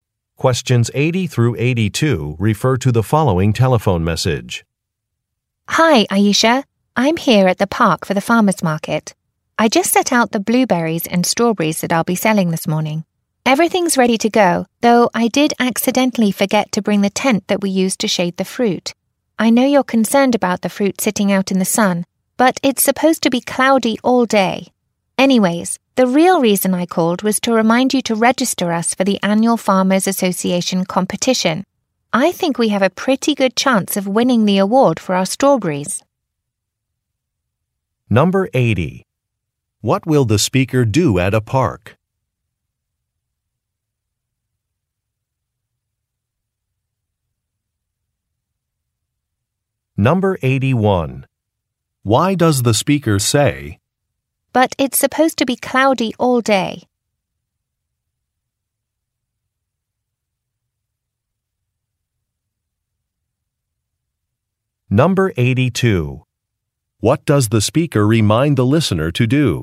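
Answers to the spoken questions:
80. Sell fruit (blueberries and strawberries) at the farmer's market
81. To reassure the listener that the fruit will be fine without the forgotten tent
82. Register them for the annual Farmers Association competition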